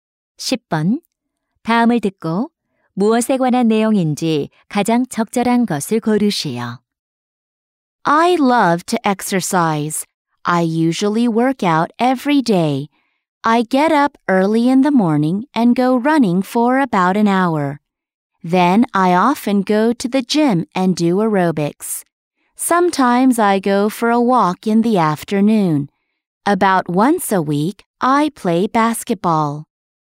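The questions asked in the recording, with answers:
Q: 다음을 듣고 무엇에 관한 내용인지 가장 적절한 것을 고르시오.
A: 운동 습관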